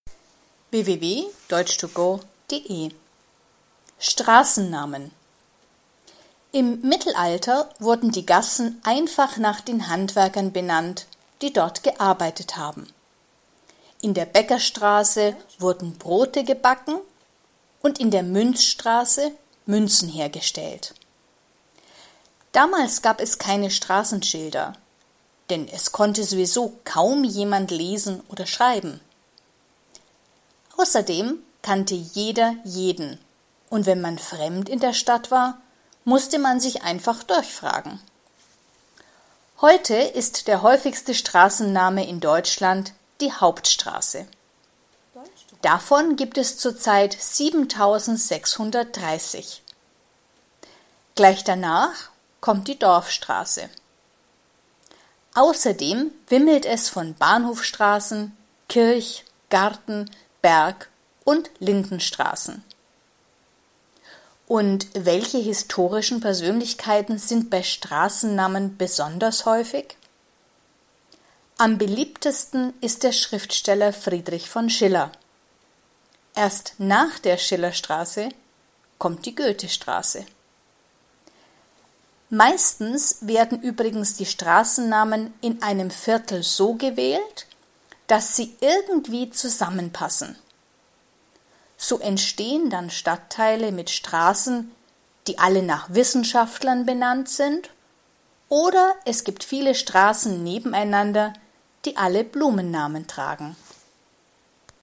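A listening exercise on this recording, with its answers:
Haben Sie das gehört? Stimmt diese Aussage?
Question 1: Im Mittelalter hatten viele Straßen den Namen von Handwerker-Gruppen, die dort arbeiteten.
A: Richtig

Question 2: Im Mittelalter gab es keine Straßenschilder, weil niemand lesen oder schreiben konnte.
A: Falsch

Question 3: Im Mittelalter kannten die Menschen jeden Straßennamen, deshalb brauchte man keine Straßenschilder.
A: Falsch

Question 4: Es gibt in Deutschland heute sehr viele Hauptstraßen und Dorfstraßen.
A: Richtig

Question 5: Es gibt in Deutschland weniger Bergstraßen als Bahnhofstraßen.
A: Falsch

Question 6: Es gibt in Deutschland mehr Goethestraßen als Schillerstraßen.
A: Falsch

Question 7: In einem Stadtteil sind oft Straßennamen, die zusammenpassen.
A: Richtig

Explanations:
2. Im Text steht: „kaum jemand" (= fast niemand) konnte lesen oder schreiben.
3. Die Menschen kannten nicht alle Straßennamen. 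Aber die Menschen kannten sich untereinander.
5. Im Text steht nur, dass es sehr viele Bergstraßen und Bahnhofstraßen gibt.
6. Es gibt mehr Schillerstraßen als Goethestraßen.

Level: Hörtexte B (mittel)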